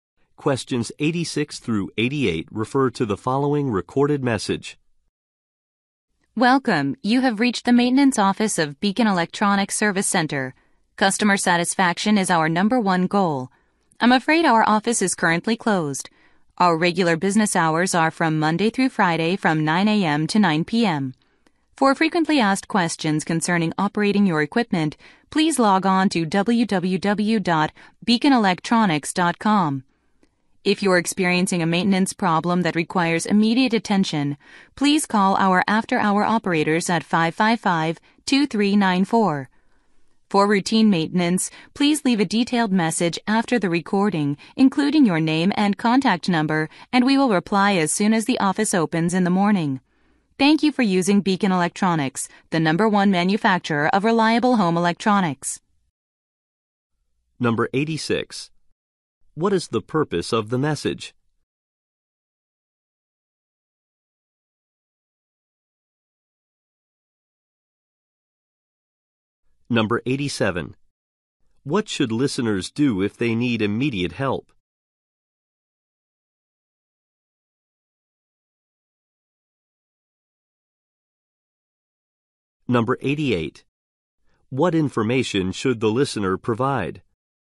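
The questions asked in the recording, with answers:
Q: What is the purpose of the message?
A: To say the office is closed and give instructions

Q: What should listeners do if they need immediate help?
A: Call the after-hours operators

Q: What information should the listener provide?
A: Their name and contact number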